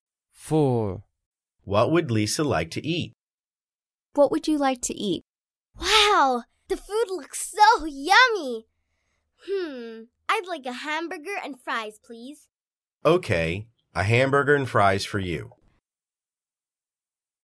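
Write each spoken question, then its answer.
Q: What would Lisa like to eat?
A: a hamburger and fries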